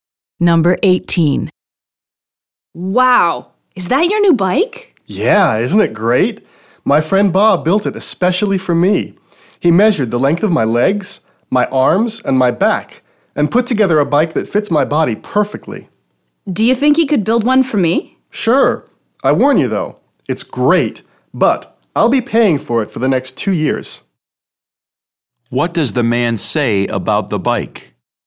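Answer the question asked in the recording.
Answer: It was very expensive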